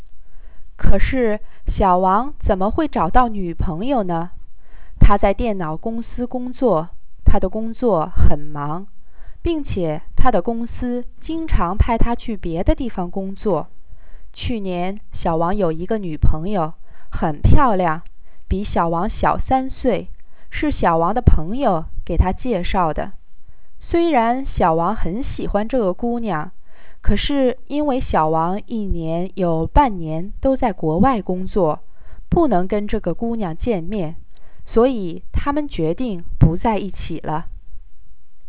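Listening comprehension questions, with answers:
Please listen to the passage and answer the following questions in English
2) Why does Xiaowang have difficulty in finding a girlfriend?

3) What was Xiaowang's ex-girlfriend like? Why did they break up?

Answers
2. He works at a computer company, is very busy, and is often sent to work in other places.
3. She was very pretty and 3 years younger than him; they broke up because he worked abroad half the year and couldn't meet her.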